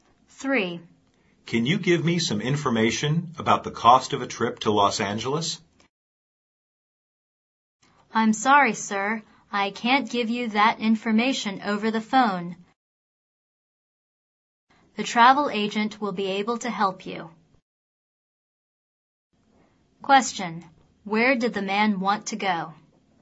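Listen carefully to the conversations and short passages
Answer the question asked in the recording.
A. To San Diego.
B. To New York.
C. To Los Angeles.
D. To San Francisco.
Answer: C. To Los Angeles.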